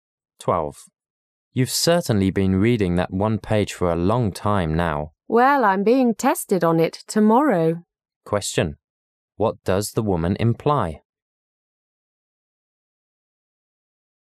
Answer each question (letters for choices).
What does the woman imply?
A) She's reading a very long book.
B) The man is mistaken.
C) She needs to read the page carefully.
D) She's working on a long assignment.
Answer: C